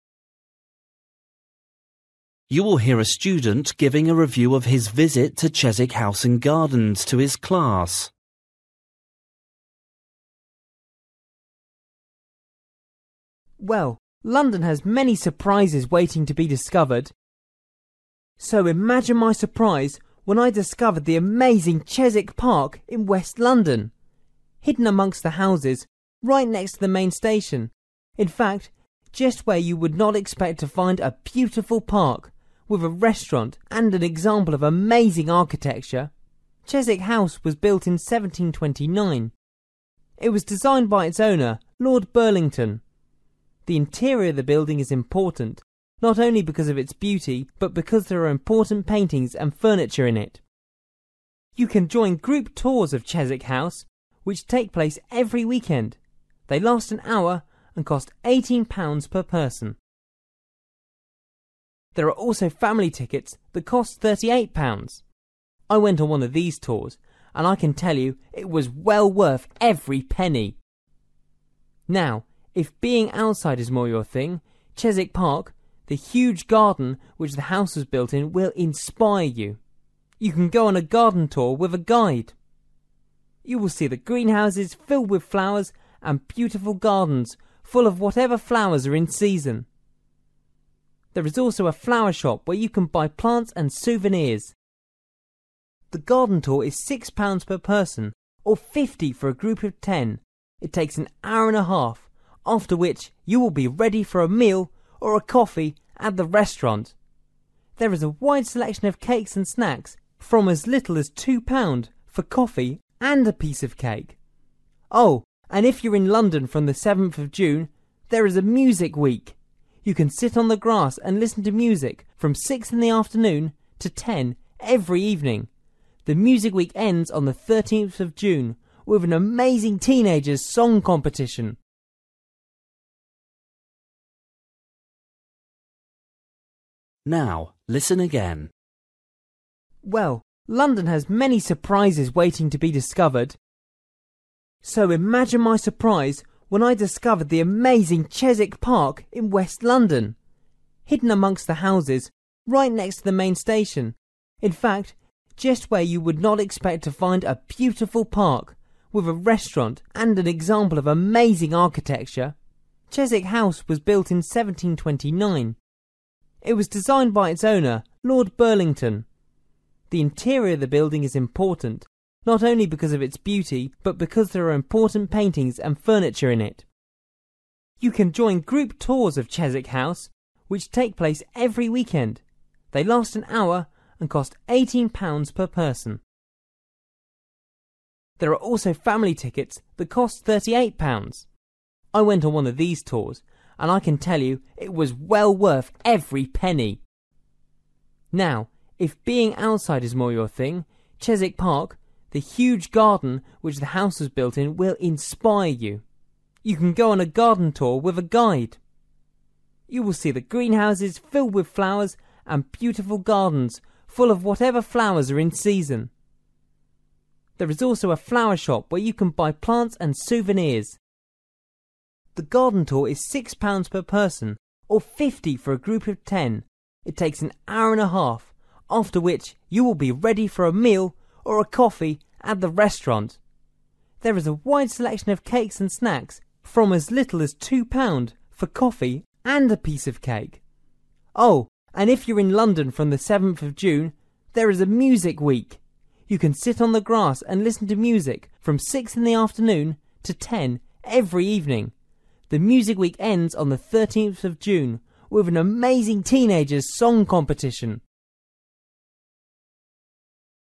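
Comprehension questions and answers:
For each question, write the correct answer in the gap. Write one or two words or a number or a date or a time. You will hear a student giving a review of his visit to Chiswick House and Gardens to his class.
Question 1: Chiswick Park is in: (1)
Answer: West London

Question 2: Chiswick House contains: paintings and (2)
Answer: furniture

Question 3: Individual ticket for House tour costs: (3) £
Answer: 18

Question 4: Things to buy in flower shop: (4) and souvenirs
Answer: plants

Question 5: Group ticket cost for garden tour: (5) £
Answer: 50

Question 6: Starting date of Music Week: (6)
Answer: 7th June

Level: Luyện nghe trình độ B1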